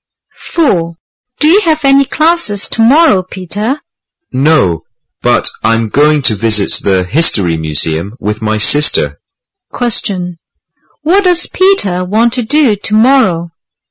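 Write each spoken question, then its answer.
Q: What does Peter want to do tomorrow?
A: Visit the History Museum with his sister.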